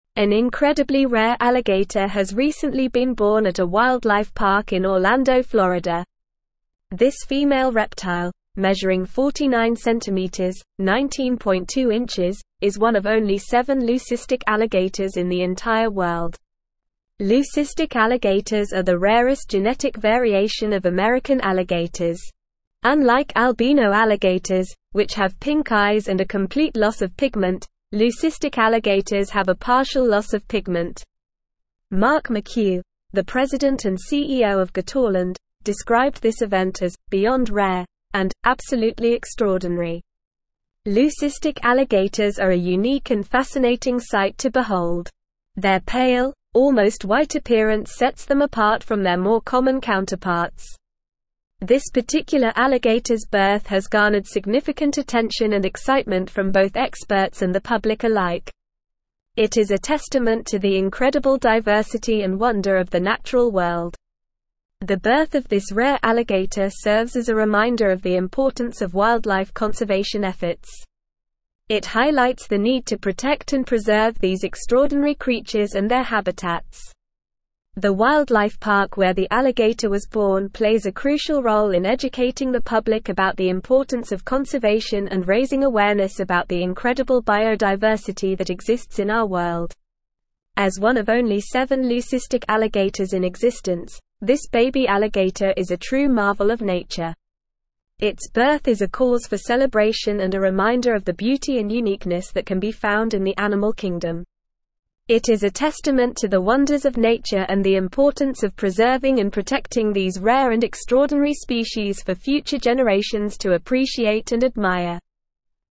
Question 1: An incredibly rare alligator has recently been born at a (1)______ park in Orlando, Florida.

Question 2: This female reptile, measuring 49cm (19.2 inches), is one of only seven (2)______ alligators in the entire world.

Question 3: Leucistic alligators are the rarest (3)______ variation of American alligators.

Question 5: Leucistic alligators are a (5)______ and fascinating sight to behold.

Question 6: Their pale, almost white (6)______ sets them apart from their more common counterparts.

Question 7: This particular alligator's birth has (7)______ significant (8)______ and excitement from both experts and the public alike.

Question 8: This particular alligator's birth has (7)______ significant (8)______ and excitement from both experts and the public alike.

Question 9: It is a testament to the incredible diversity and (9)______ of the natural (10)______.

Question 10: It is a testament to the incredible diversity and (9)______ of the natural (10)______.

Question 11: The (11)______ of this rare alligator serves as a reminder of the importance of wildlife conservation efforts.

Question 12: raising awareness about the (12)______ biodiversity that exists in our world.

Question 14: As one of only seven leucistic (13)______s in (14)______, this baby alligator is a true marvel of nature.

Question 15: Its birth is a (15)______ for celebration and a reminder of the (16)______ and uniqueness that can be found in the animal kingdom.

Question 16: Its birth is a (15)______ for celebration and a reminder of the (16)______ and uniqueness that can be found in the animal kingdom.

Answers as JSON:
{"1": "wildlife", "2": "leucistic", "3": "genetic", "5": "unique", "6": "appearance", "7": "garnered", "8": "attention", "9": "wonder", "10": "world", "11": "birth", "12": "incredible", "14": "existence", "15": "cause", "16": "beauty"}

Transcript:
An incredibly rare alligator has recently been born at a wildlife park in Orlando, Florida. This female reptile, measuring 49cm (19.2 inches), is one of only seven leucistic alligators in the entire world. Leucistic alligators are the rarest genetic variation of American alligators. Unlike albino alligators, which have pink eyes and a complete loss of pigment, leucistic alligators have a partial loss of pigment. Mark McHugh, the president and CEO of Gatorland, described this event as "beyond rare" and "absolutely extraordinary."
Leucistic alligators are a unique and fascinating sight to behold. Their pale, almost white appearance sets them apart from their more common counterparts. This particular alligator's birth has garnered significant attention and excitement from both experts and the public alike. It is a testament to the incredible diversity and wonder of the natural world.
The birth of this rare alligator serves as a reminder of the importance of wildlife conservation efforts. It highlights the need to protect and preserve these extraordinary creatures and their habitats. The wildlife park where the alligator was born plays a crucial role in educating the public about the importance of conservation and raising awareness about the incredible biodiversity that exists in our world.
As one of only seven leucistic alligators in existence, this baby alligator is a true marvel of nature. Its birth is a cause for celebration and a reminder of the beauty and uniqueness that can be found in the animal kingdom. It is a testament to the wonders of nature and the importance of preserving and protecting these rare and extraordinary species for future generations to appreciate and admire.

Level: Level 4